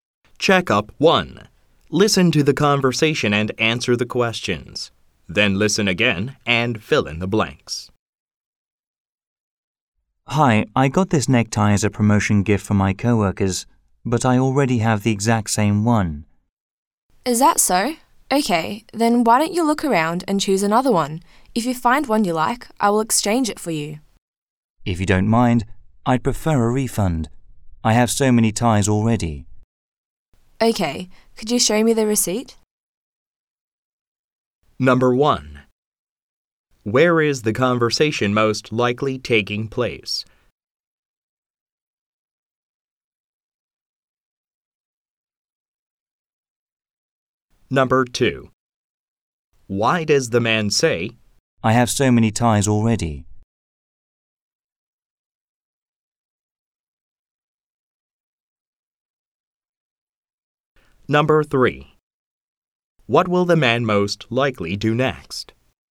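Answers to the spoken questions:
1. In a store (clothing/tie shop)
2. To explain why he wants a refund instead of an exchange
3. Show the receipt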